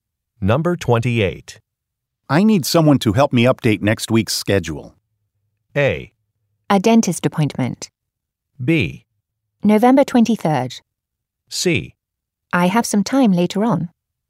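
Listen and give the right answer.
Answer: C: I have some time later on.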